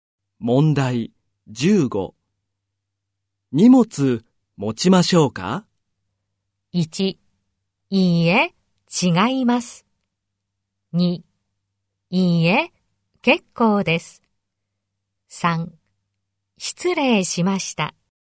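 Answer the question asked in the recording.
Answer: 2: いいえ、結構です。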